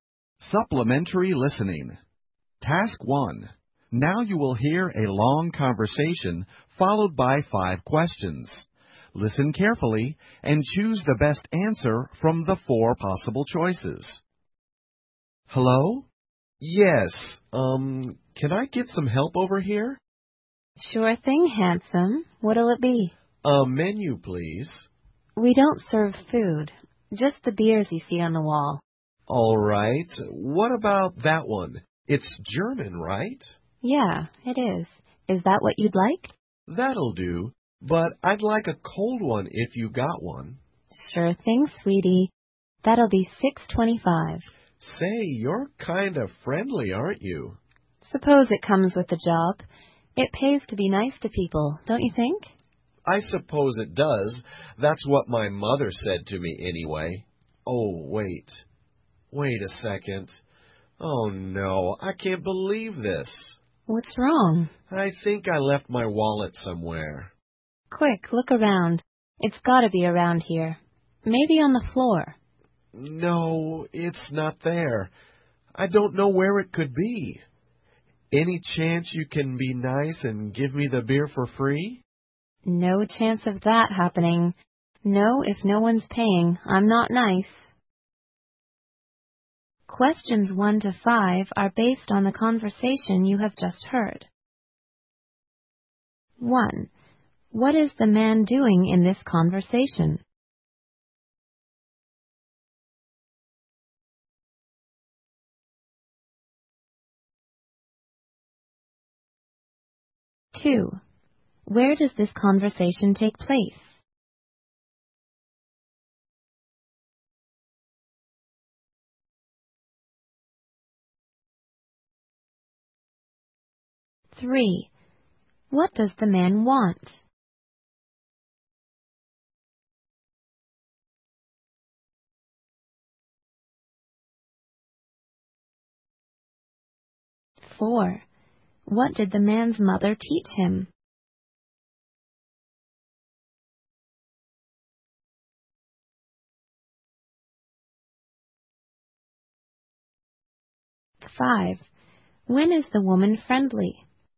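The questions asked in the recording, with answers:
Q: What is the man doing in this conversation?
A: Ordering a beer

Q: Where does this conversation take place?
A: In a bar

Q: What did the man's mother teach him?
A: It pays to be nice to people

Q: When is the woman friendly?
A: When people are paying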